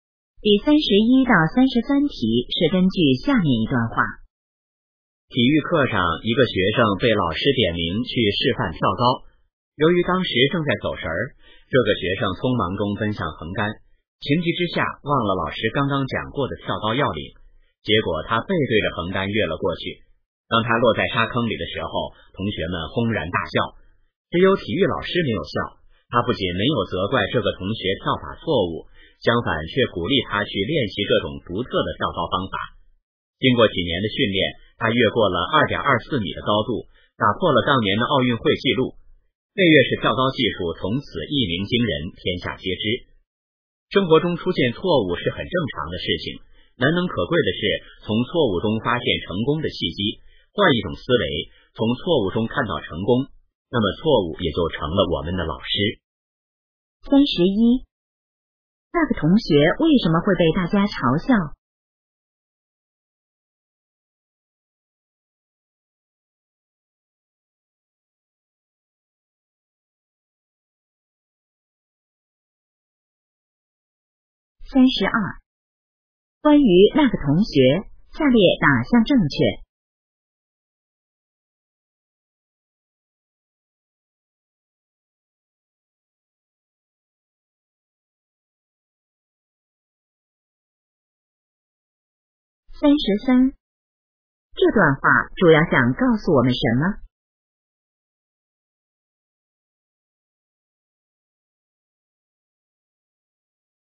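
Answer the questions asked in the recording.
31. 他背对着横杆跳了过去
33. 要从错误中发现成功的契机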